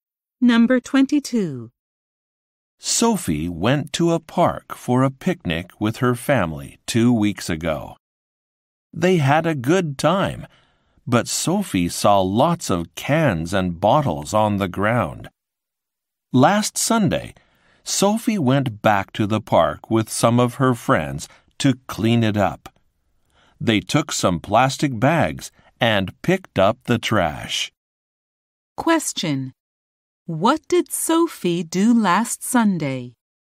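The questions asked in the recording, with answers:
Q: What did Sophie do last Sunday?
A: Cleaned up trash in the park with friends.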